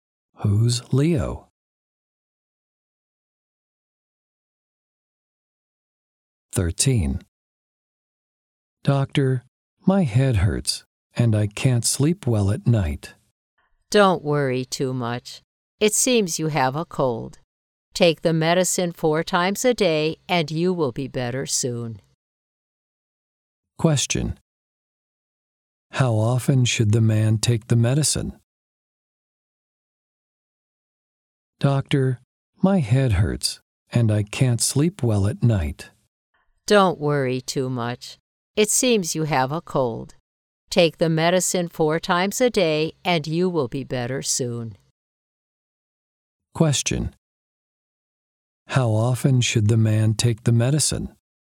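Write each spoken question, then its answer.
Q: How often should the man take the medicine?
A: Four times a day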